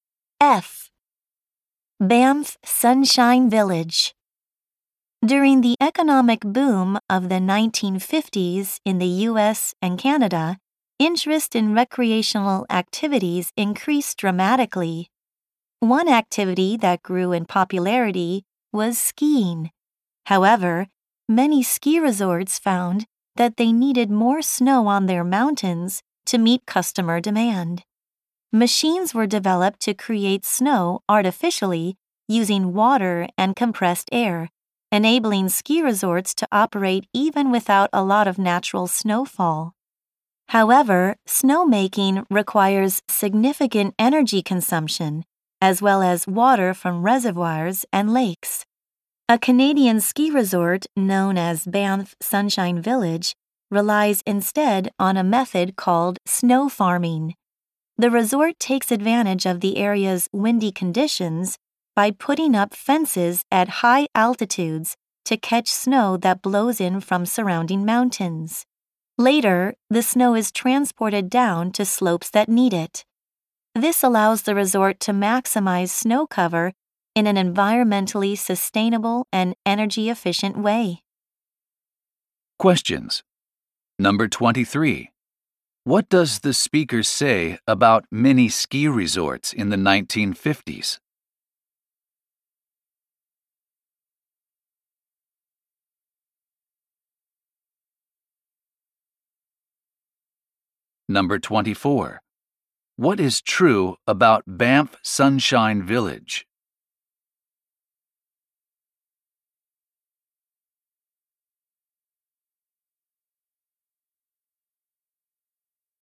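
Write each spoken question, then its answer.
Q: What does the speaker say about mini ski resorts in the 1950s?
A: They needed more snow to meet customer demand

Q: What is true about Banff Sunshine Village?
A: It uses snow farming, catching wind-blown snow with fences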